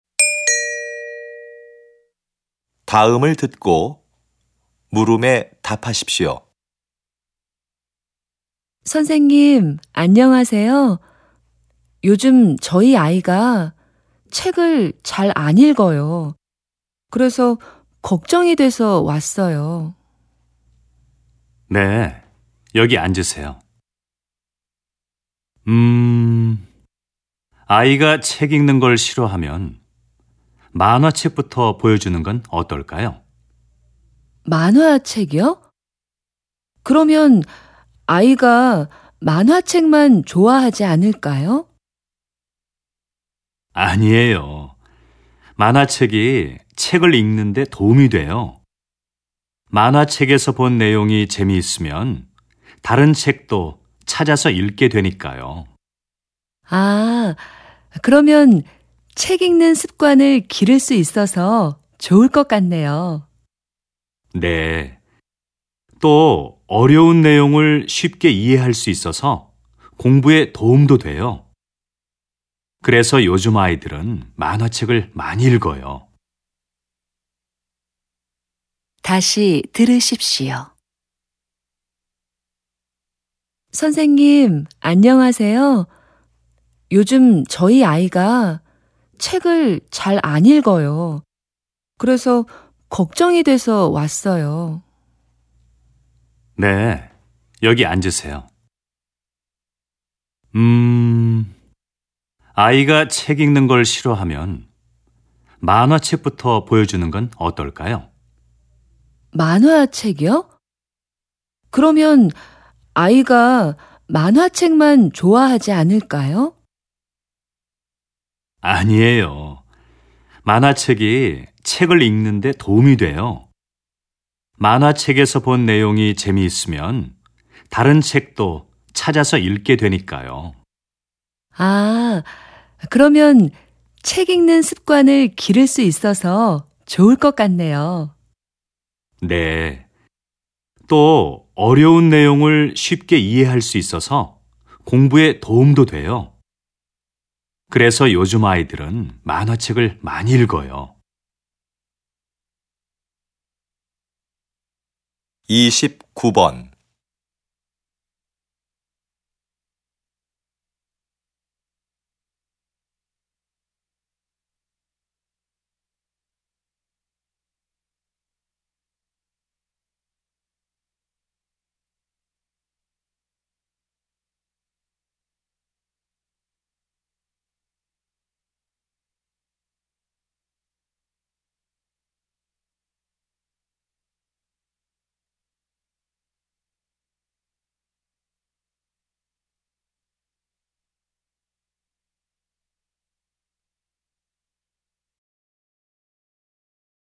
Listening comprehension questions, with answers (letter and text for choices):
[29~30] 다음을 듣고 물음에 답하십시오.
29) 여자는 왜 남자를 찾아왔는지 맞는 것을 고르십시오.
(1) 만화책을 읽고 싶어서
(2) 아이가 공부를 잘 못해서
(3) 아이가 책 읽기를 싫어해서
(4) 만화책의 좋은 점을 알고 싶어서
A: (3) 아이가 책 읽기를 싫어해서

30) 들은 내용과 같은 것을 고르십시오.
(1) 요즘 아이들은 만화책을 읽지 않습니다.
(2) 만화책으로는 어려운 내용을 이해하기 힘듭니다.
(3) 책 내용이 재미있으면 만화책을 찾아서 읽습니다.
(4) 만화책을 읽으면 책 읽는 습관을 기를 수 있습니다.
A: (4) 만화책을 읽으면 책 읽는 습관을 기를 수 있습니다.

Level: TOPIK I